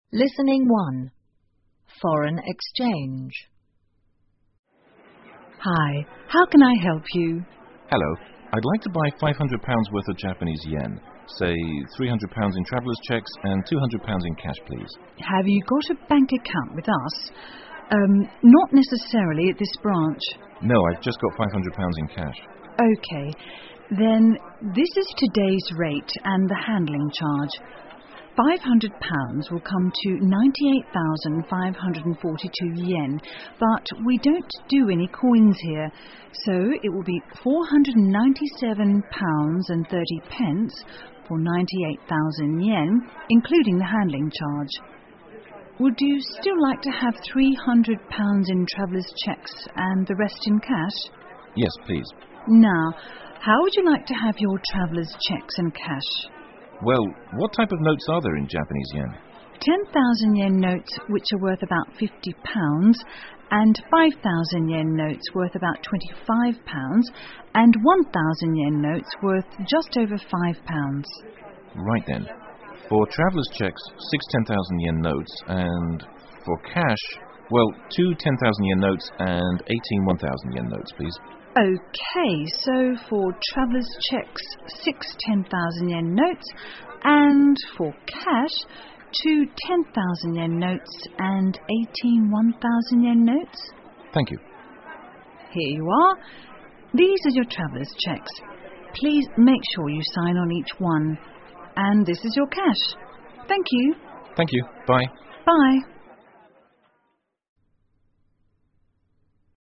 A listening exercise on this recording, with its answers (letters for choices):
请根据对话内容,选出一个正确的答案。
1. Where is this conversation being held?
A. At a travel agency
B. At a stock exchange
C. At a branch of a bank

请根据对话内容回答问题。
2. How much would the customer like to have in traveller's cheques?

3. Has the customer got a bank account at the branch?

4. Does the bank have any coins in Japanese yen?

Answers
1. C
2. $300
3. No
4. No